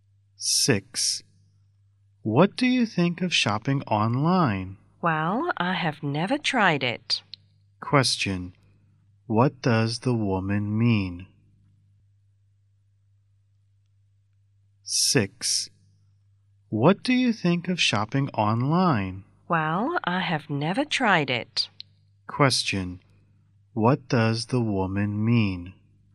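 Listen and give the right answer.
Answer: She has never tried shopping online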